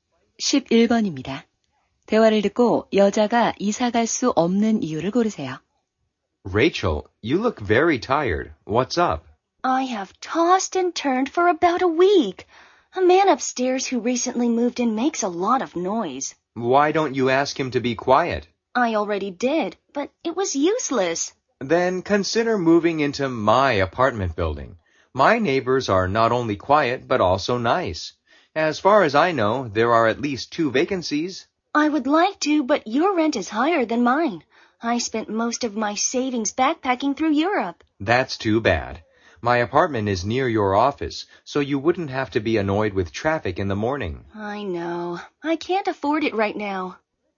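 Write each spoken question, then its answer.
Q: 대화를 듣고 여자가 이사 갈 수 없는 이유를 고르세요.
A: 집세가 비싸서 (저축을 여행에 다 써서)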